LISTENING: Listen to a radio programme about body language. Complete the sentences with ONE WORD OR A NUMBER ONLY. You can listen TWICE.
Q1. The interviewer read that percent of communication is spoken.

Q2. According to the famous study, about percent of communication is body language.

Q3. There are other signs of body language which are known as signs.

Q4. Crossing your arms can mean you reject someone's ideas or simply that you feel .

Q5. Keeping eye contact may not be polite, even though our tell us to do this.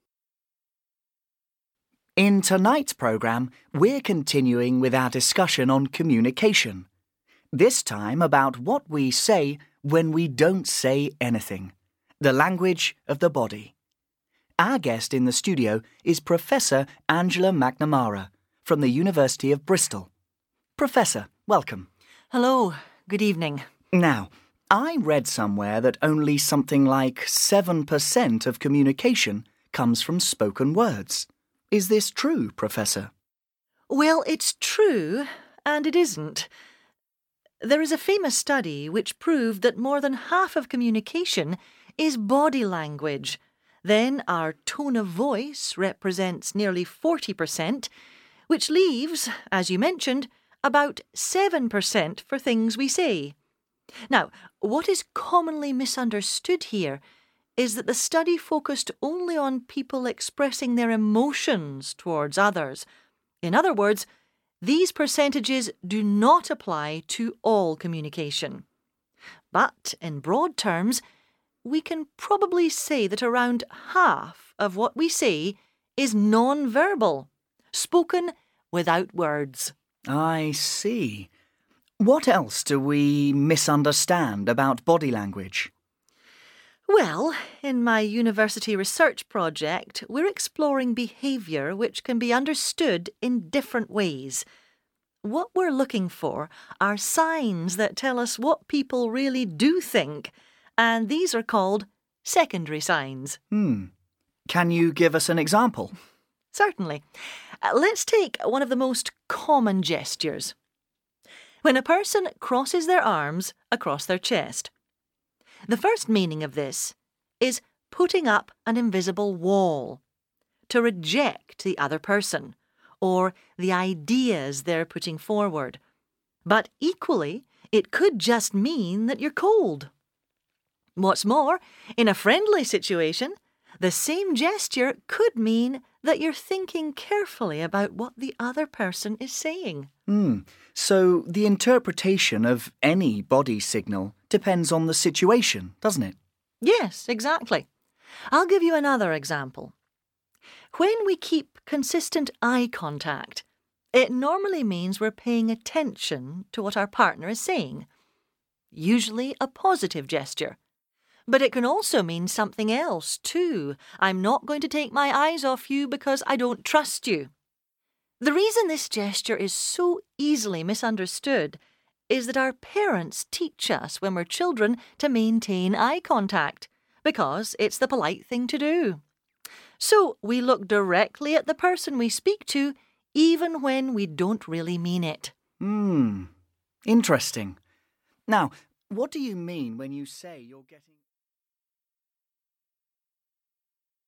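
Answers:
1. 7
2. 50
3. secondary
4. cold
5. parents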